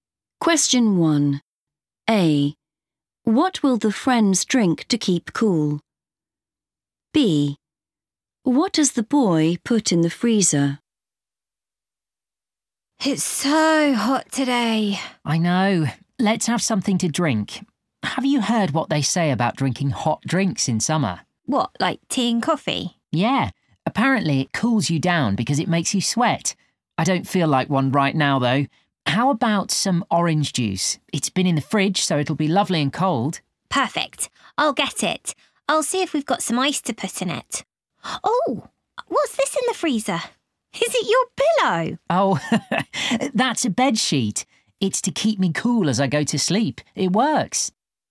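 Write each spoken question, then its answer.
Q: What will the friends drink to keep cool?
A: orange juice

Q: What does the boy put in the freezer?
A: a bed sheet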